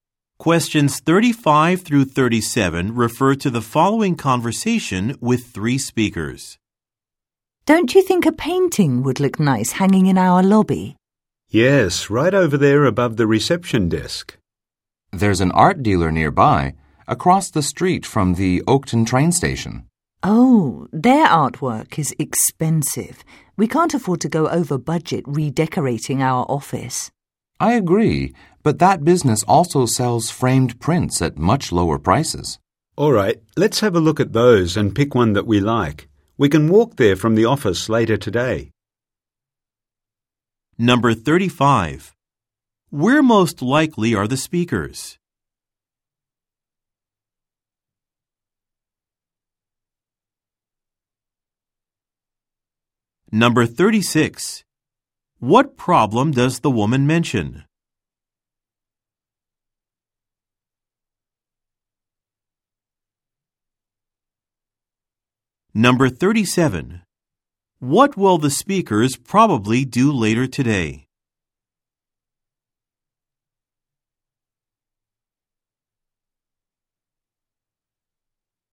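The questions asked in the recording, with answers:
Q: Where most likely are the speakers?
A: In an office

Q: What problem does the woman mention?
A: The artwork is expensive / they can't go over budget

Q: What will the speakers probably do later today?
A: Walk to the art dealer to look at framed prints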